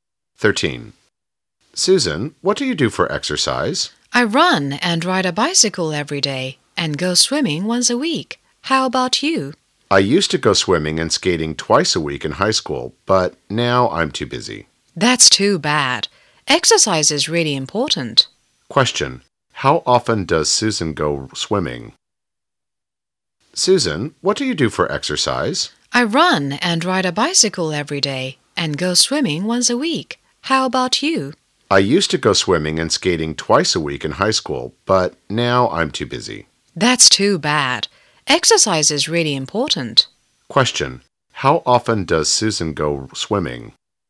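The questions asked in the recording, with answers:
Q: How often does Susan go swimming?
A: Once a week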